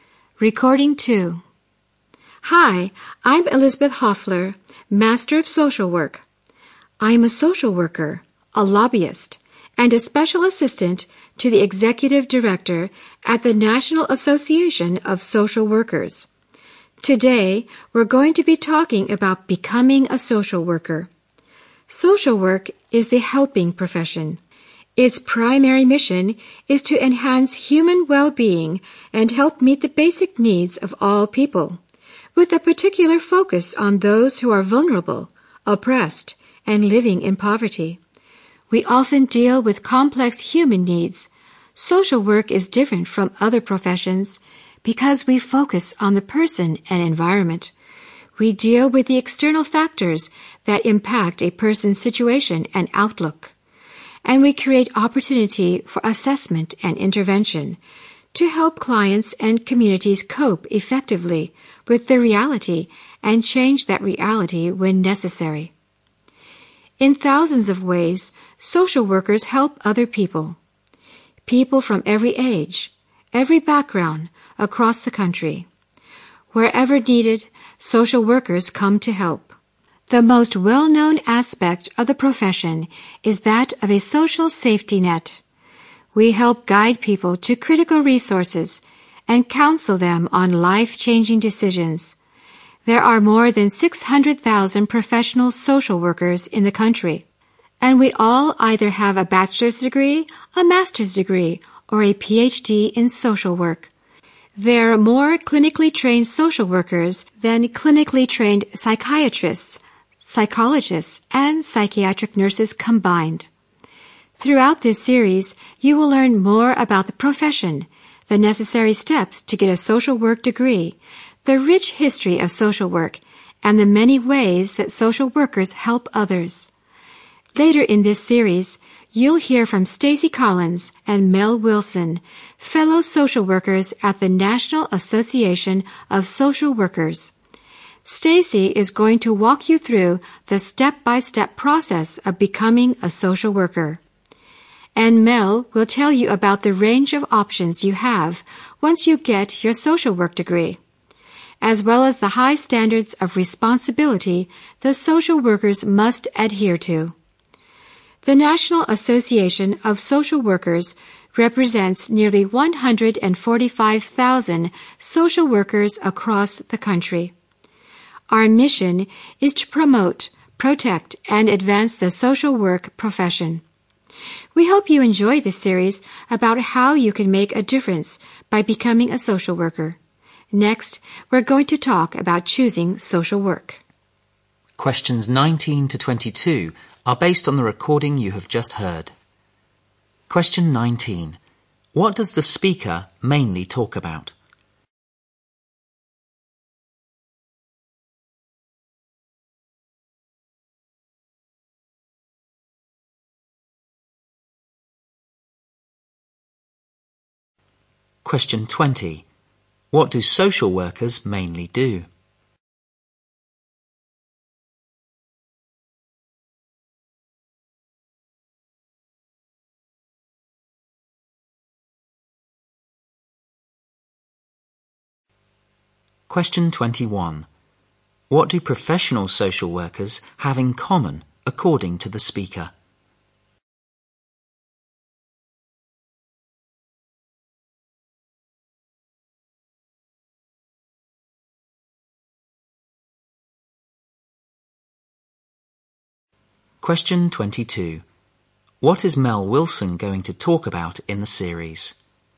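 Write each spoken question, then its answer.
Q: What does the speaker mainly talk about?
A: Becoming a social worker.

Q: What do social workers mainly do?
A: Help people, especially the vulnerable, meet their basic needs.

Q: What do professional social workers have in common according to the speaker?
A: They all have a degree in social work.

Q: What is Mel Wilson going to talk about in the series?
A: Career options with a social work degree and the high standards of responsibility.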